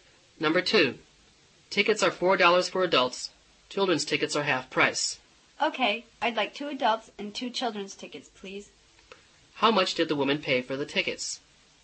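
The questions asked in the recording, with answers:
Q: How much did the woman pay for the tickets?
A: $12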